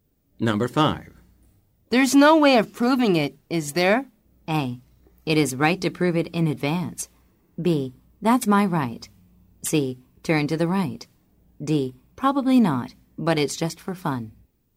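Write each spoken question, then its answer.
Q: There's no way of proving it, is there?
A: D: Probably not, but it's just for fun.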